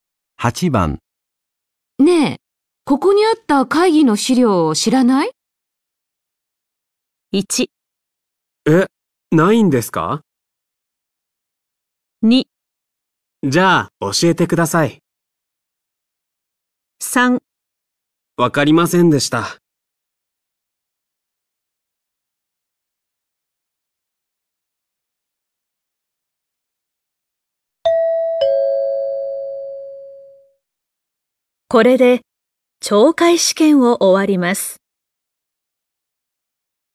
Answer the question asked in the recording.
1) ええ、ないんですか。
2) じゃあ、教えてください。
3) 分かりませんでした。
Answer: 1) ええ、ないんですか。

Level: N4 Listening · Test 1